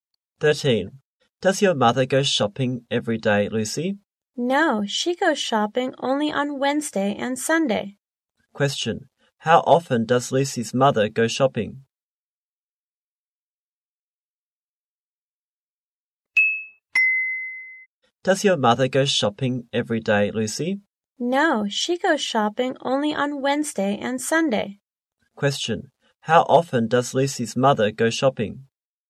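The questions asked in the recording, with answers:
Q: How often does Lucy's mother go shopping?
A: Twice a week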